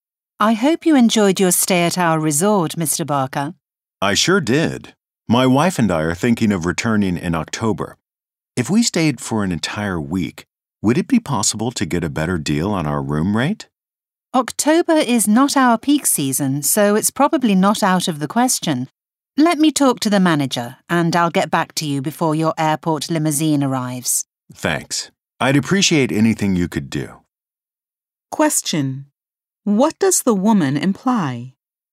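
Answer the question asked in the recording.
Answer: He can probably get a lower room rate for a week-long stay in October.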